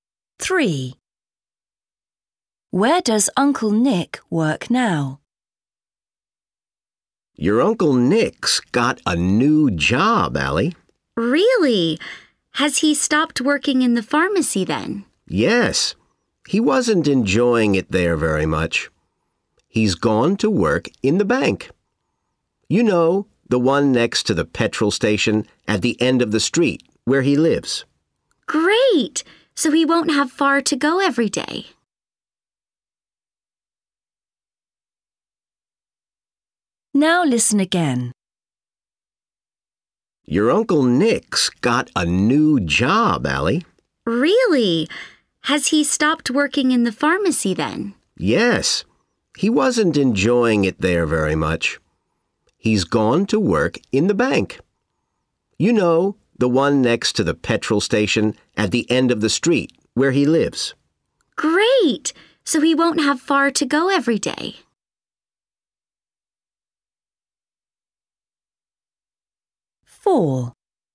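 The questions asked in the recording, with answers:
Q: Where does Uncle Nick work now?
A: in the bank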